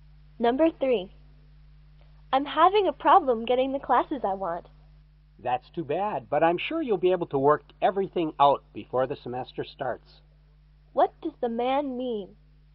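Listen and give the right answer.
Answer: The woman will sort out her classes before the semester starts.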